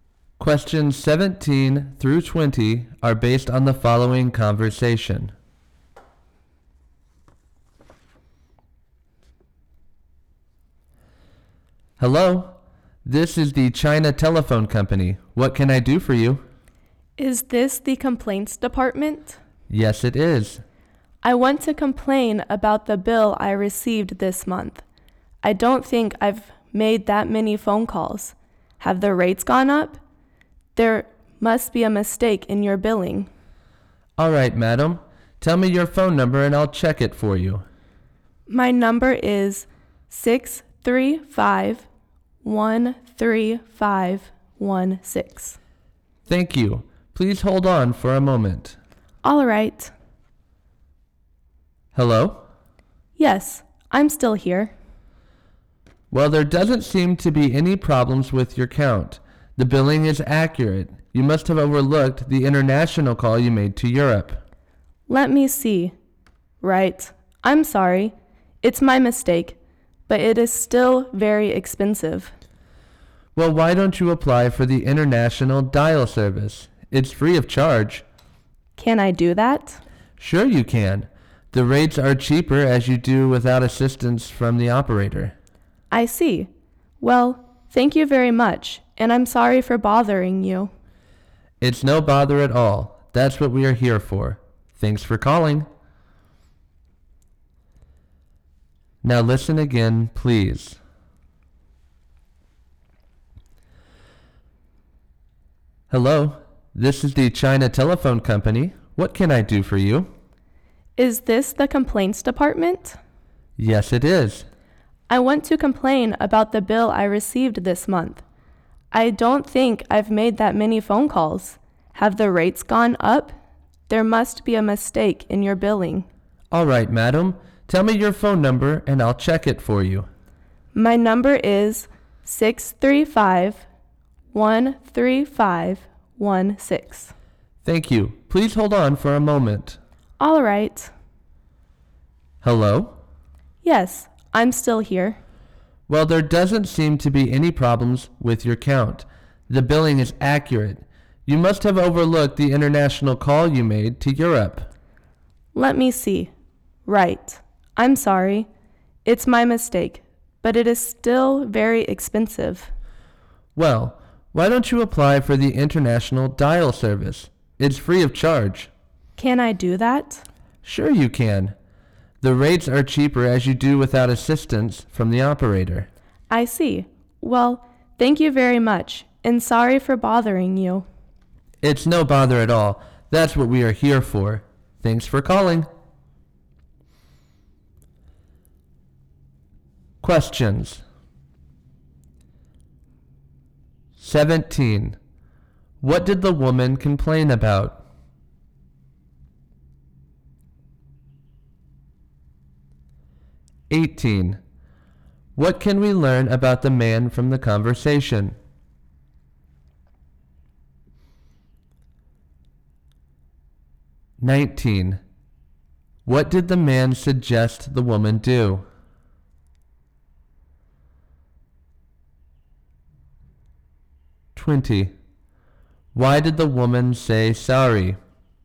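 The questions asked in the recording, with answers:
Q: What did the woman complain about?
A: Her phone bill this month was too high

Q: What did the man suggest the woman do?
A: Apply for the international dial service

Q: Why did the woman say sorry?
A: She had overlooked her international call to Europe; the bill was correct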